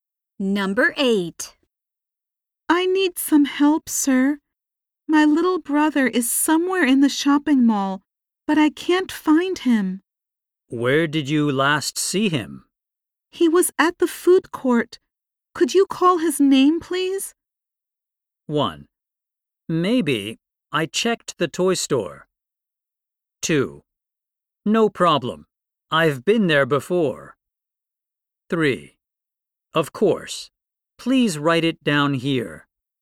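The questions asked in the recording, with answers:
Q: He was at the food court. Could you call his name, please?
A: 3: Of course. Please write it down here.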